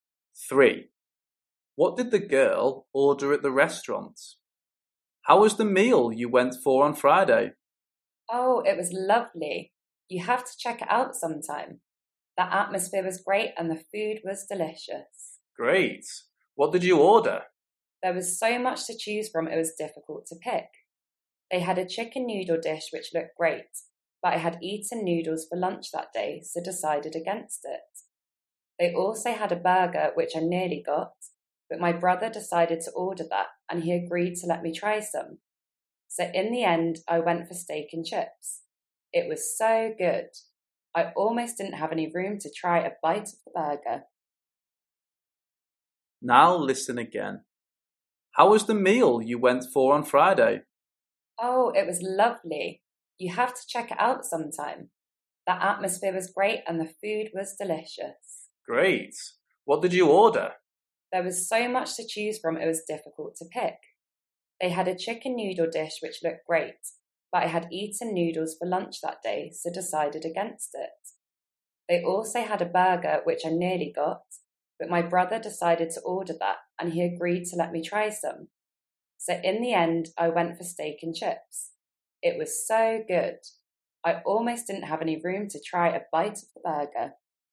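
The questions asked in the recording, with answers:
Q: What did the girl order at the restaurant?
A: Steak and chips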